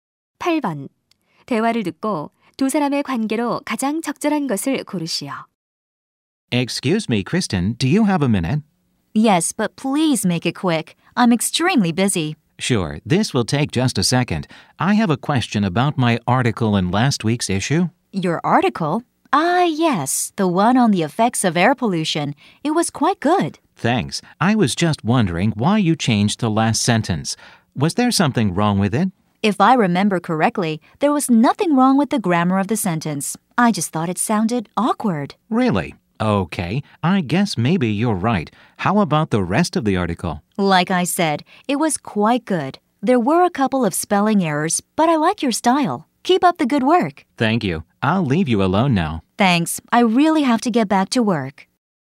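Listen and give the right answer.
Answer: 편집자 - 기자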